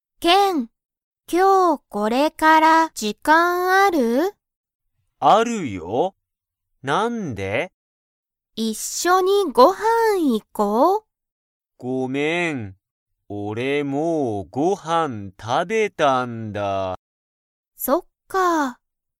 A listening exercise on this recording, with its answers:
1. ケンは、もうご飯(はん)を食(た)べましたか?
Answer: はい

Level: Level 1